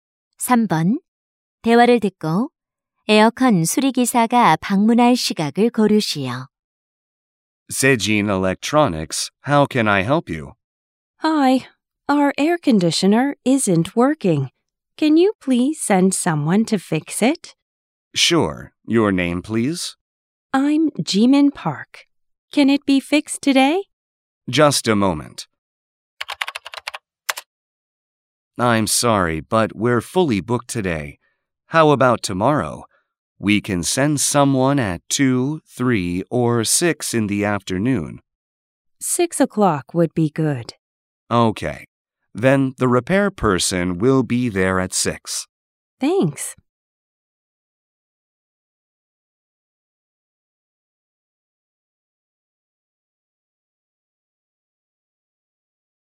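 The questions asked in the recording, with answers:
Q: 대화를 듣고 에어컨 수리기사가 방문할 시각을 고르시오.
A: 내일 오후 6시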